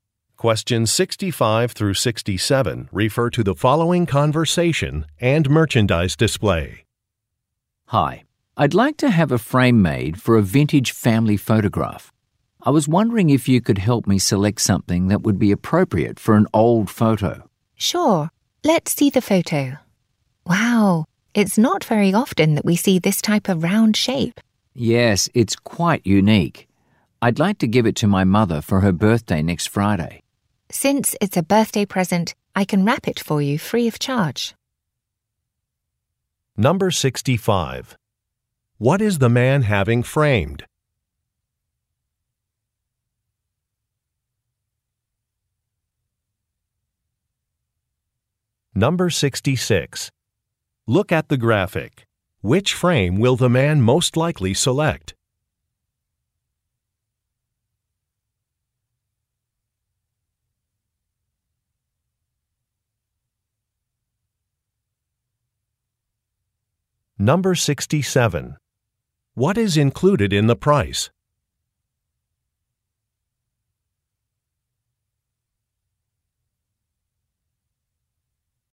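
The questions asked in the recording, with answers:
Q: What is the man having framed?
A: A vintage family photograph

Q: What is included in the price?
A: Gift wrapping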